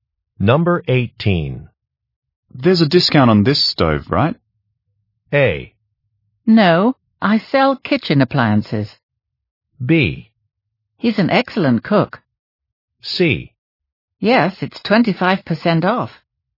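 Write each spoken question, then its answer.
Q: There's a discount on this stove, right?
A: C: Yes, it's 25% off.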